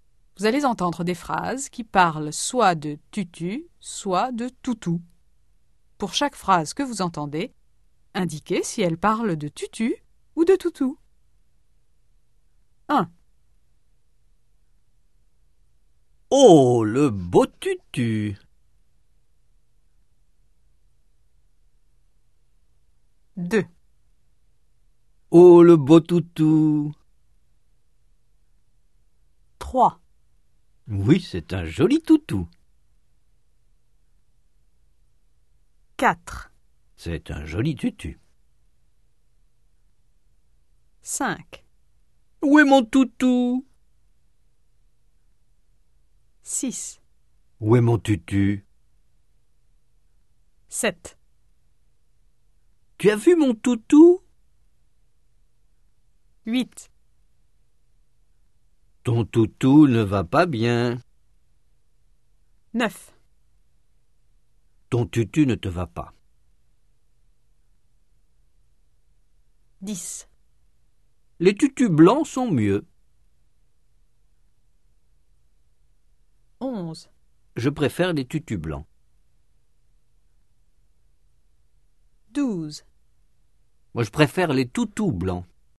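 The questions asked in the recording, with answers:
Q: Oh, le beau tutu!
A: tutu

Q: Oh, le beau toutou!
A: toutou

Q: Oui, c'est un joli toutou.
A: toutou

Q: C'est un joli tutu.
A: tutu

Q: Où est mon toutou?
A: toutou

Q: Où est mon tutu?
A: tutu

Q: Tu as vu mon toutou?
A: toutou

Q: Ton toutou ne va pas bien.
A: toutou

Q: Ton tutu ne te va pas.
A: tutu

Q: Les tutus blancs sont mieux.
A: tutu

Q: Je préfère les tutus blancs.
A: tutu

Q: Moi, je préfère les toutous blancs.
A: toutou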